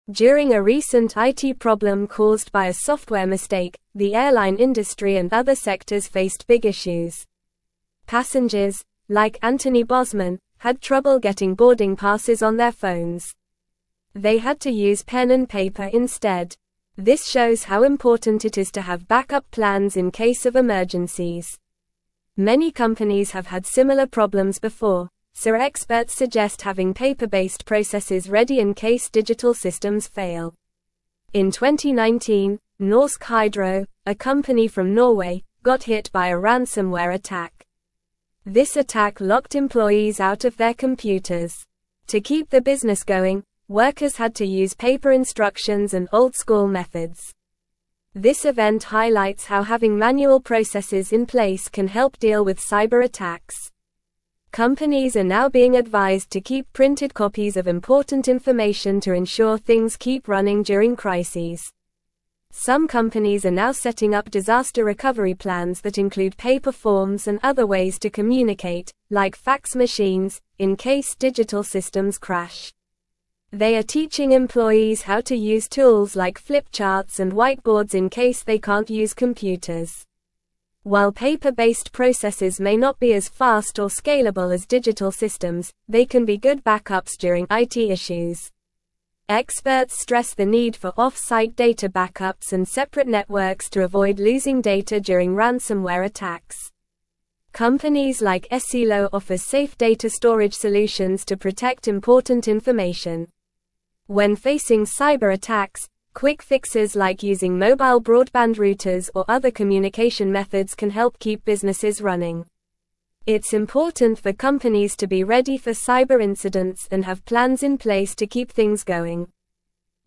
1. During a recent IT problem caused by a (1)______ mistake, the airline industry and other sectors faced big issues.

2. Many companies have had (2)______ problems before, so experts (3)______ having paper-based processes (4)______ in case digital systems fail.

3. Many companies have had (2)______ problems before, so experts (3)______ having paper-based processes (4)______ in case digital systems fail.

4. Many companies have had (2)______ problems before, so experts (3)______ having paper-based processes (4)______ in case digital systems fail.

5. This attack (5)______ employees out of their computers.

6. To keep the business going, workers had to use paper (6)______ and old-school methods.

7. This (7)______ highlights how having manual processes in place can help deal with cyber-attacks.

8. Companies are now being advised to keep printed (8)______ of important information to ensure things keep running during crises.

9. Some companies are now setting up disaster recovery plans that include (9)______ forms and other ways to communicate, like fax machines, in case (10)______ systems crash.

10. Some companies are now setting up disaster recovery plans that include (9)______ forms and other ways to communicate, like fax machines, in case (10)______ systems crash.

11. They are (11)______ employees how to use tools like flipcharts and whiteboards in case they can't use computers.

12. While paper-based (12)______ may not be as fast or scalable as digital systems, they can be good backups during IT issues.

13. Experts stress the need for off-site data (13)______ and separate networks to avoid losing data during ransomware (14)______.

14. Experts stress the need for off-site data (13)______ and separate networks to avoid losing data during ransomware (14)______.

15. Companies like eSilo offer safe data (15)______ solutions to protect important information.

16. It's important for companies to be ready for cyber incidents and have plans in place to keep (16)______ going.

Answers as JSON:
{"1": "software", "2": "similar", "3": "suggest", "4": "ready", "5": "locked", "6": "instructions", "7": "event", "8": "copies", "9": "paper", "10": "digital", "11": "teaching", "12": "processes", "13": "backups", "14": "attacks", "15": "storage", "16": "things"}

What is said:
During a recent IT problem caused by a software mistake, the airline industry and other sectors faced big issues. Passengers, like Anthony Bosman, had trouble getting boarding passes on their phones. They had to use pen and paper instead. This shows how important it is to have backup plans in case of emergencies. Many companies have had similar problems before, so experts suggest having paper-based processes ready in case digital systems fail.
In 2019, Norsk Hydro, a company from Norway, got hit by a ransomware attack. This attack locked employees out of their computers. To keep the business going, workers had to use paper instructions and old-school methods. This event highlights how having manual processes in place can help deal with cyber-attacks. Companies are now being advised to keep printed copies of important information to ensure things keep running during crises.
Some companies are now setting up disaster recovery plans that include paper forms and other ways to communicate, like fax machines, in case digital systems crash. They are teaching employees how to use tools like flipcharts and whiteboards in case they can't use computers. While paper-based processes may not be as fast or scalable as digital systems, they can be good backups during IT issues.
Experts stress the need for off-site data backups and separate networks to avoid losing data during ransomware attacks. Companies like eSilo offer safe data storage solutions to protect important information. When facing cyber-attacks, quick fixes like using mobile broadband routers or other communication methods can help keep businesses running. It's important for companies to be ready for cyber incidents and have plans in place to keep things going.

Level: Level 3